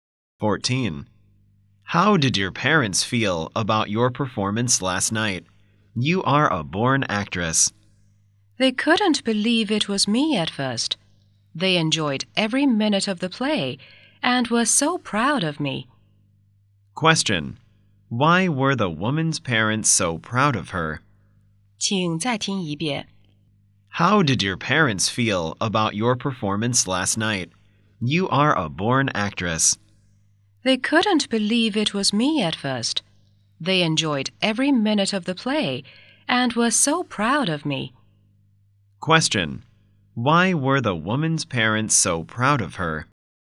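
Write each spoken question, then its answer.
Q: Why were the woman's parents so proud of her?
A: She performed very well in the play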